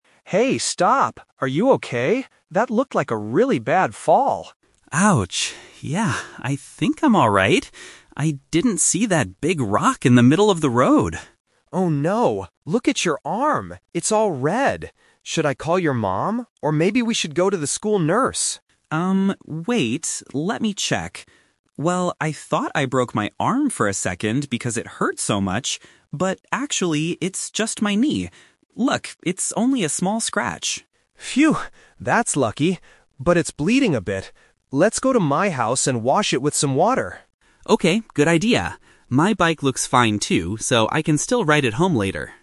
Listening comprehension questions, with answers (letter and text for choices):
Listen to the conversation and circle the correct answer (A, B, or C).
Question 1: Why did the boy fall off his bike?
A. Because he was riding too fast.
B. Because he hit a large rock.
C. Because his bike was broken.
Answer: B. Because he hit a large rock.

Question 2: What is the boy's actual injury?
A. A broken arm.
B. A small scratch on his knee.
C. A serious head injury.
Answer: B. A small scratch on his knee.

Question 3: What are the boys going to do next?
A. Go to Tom's house.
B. Call Jack's mother.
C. Visit the school nurse.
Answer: A. Go to Tom's house.

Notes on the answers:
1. Jack says, "I didn't see that big rock in the middle of the road." Option (C) is a trap because he mentions his bike at the end, but says it "looks fine".
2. This is the "Twist". Jack says he thought he broke his arm (Option A - Trap), but then clarifies "it's actually just my knee... only a small scratch."
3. Tom suggests, "Let's go to my house and wash it," and Jack agrees. Options (B) and (C) are traps because Tom suggested them earlier, but Jack didn't think they were necessary.

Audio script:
Boy 1 (Tom): Hey, stop! Are you okay? That looked like a really bad fall!
Boy 2 (Jack): Ouch... yeah, I think I'm alright. I didn't see that big rock in the middle of the road.
Tom: Oh no, look at your arm. It's all red! Should I call your mom or maybe we should go to the school nurse?
let me check. Well, I thought I broke my arm for a second because it hurt so much, but actually, it's just my knee. Look, it's only a small scratch.
Tom: Phew! That's lucky. But it's bleeding a bit. Let's go to my house and wash it with some water.